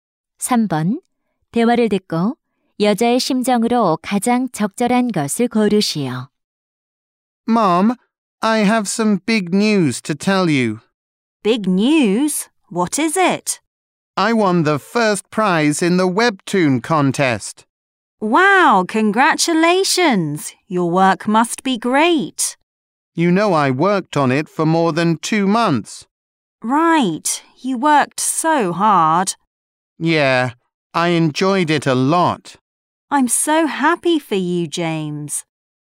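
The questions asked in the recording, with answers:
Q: 대화를 듣고 여자의 심정으로 가장 적절한 것을 고르시오.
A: 기쁨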